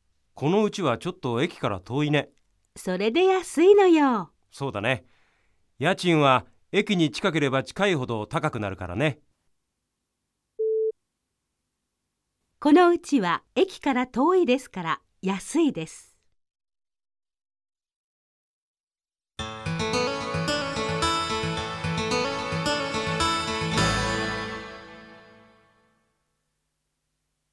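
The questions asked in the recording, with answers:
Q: この家は駅から遠いですから安いです。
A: ○(正しい)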